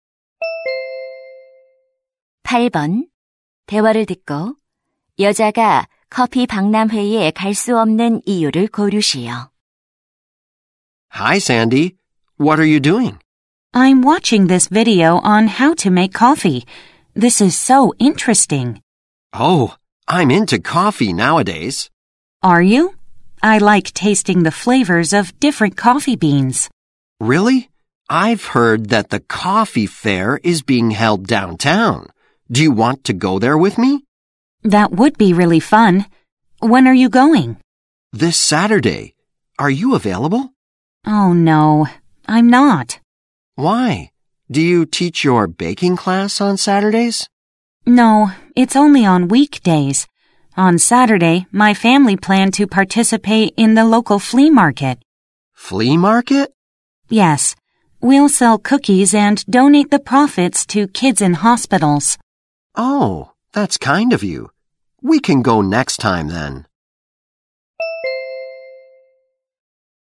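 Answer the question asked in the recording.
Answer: 가족과 지역 벼룩시장에 참여해야 해서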